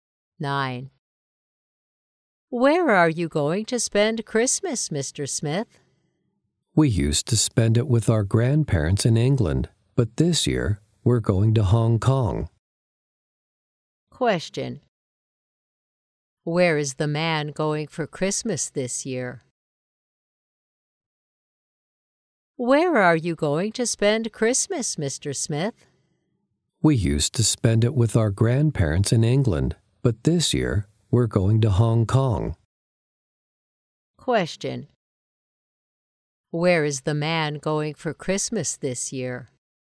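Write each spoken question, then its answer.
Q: Where is the man going for Christmas this year?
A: Hong Kong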